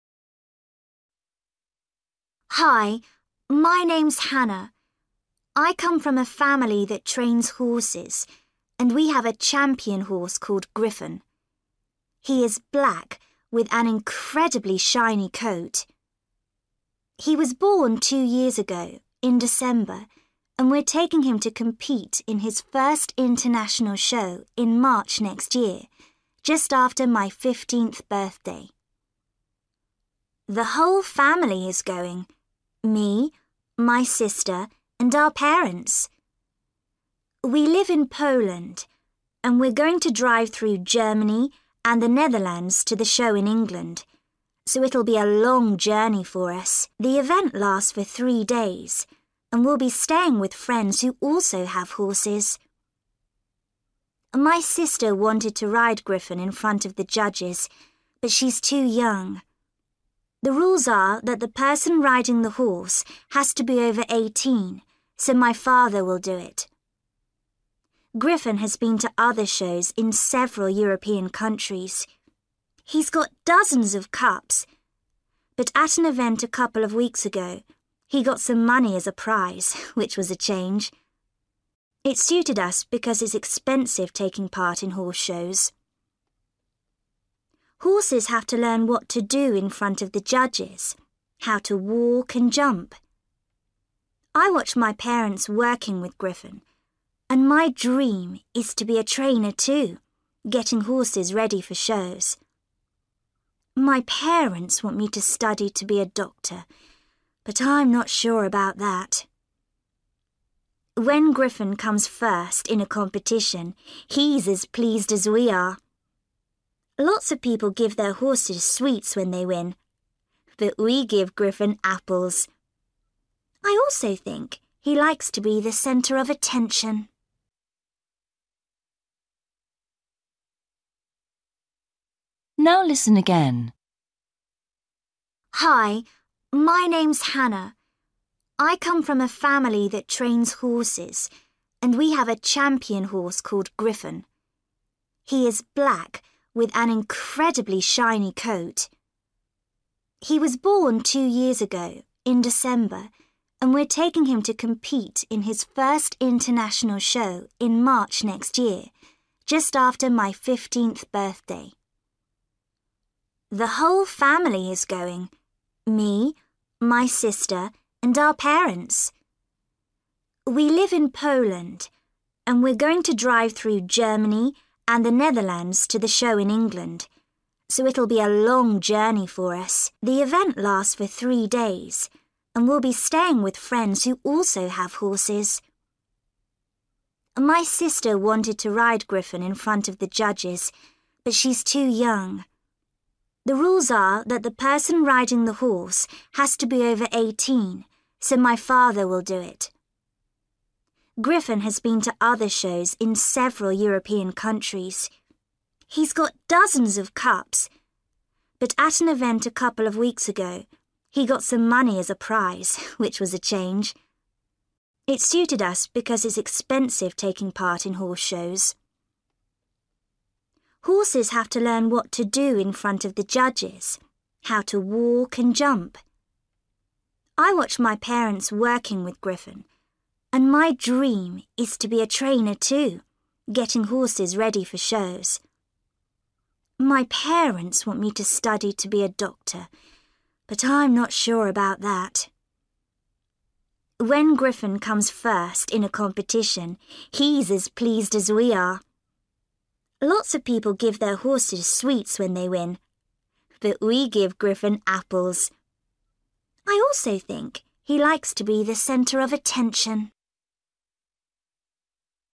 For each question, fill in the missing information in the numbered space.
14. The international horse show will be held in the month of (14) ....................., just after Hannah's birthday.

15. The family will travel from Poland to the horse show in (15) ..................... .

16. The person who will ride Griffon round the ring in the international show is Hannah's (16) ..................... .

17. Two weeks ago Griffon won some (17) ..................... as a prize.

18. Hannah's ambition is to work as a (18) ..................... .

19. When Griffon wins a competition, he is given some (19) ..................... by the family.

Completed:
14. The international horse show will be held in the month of March, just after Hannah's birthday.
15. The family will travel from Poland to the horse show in England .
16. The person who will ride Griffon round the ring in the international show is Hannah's father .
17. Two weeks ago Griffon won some money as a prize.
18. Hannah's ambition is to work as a trainer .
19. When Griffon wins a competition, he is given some apples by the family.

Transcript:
Hannah: Hi. My name's Hannah. I come from a family that trains horses, and we have a champion horse called Griffon. He is black with an incredibly shiny coat. He was born two years ago, in December, and we're taking him to compete in his first international show in March next year, just after my fifteenth birthday.
The whole family is going – me, my sister and our parents. We live in Poland and we're going to drive through Germany and the Netherlands to the show in England, so it'll be a long journey for us. The event lasts for three days, and we'll be staying with friends who also have horses.
My sister wanted to ride Griffon in front of the judges, but she's too young. The rules are that the person riding the horse has to be over 18, so my father will do it. Griffon has been to other shows in several European countries. He's got dozens of cups, but at an event a couple of weeks ago, he got some money as a prize, which was a change. It suited us because it's expensive taking part in horse shows.
Horses have to learn what to do in front of the judges – how to walk and jump. I watch my parents working with Griffon, and my dream is to be a trainer too, getting horses ready for shows. My parents want me to study to be a doctor, but I'm not sure about that.
When Griffon comes first in a competition he's as pleased as we are. Lots of people give their horses sweets when they win but we give Griffon apples. I also think he likes to be the centre of attention.

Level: B1 – Intermediate